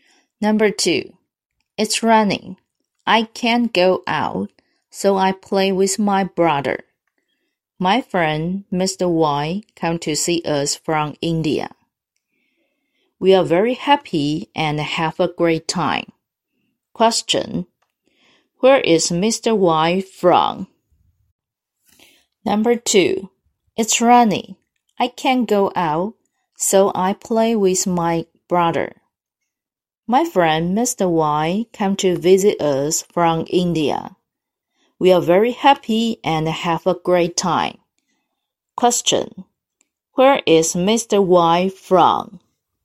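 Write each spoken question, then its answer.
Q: Where is Mr. Y from?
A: India.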